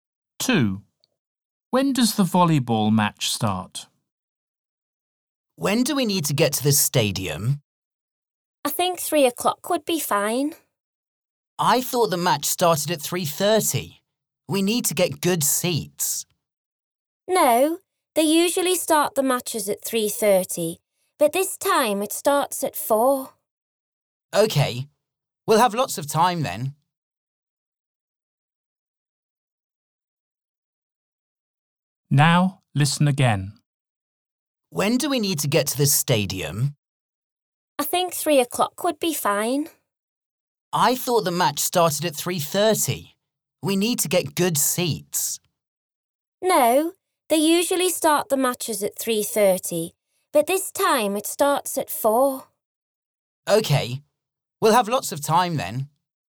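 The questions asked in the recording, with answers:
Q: When does the volleyball match start?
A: at 4 o'clock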